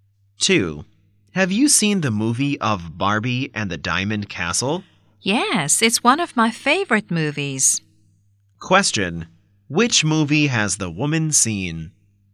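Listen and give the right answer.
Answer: Barbie and the Diamond Castle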